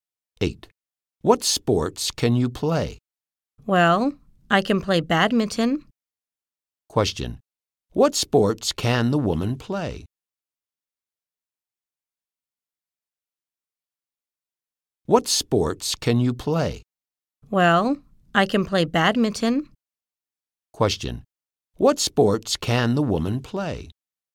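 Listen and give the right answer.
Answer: Badminton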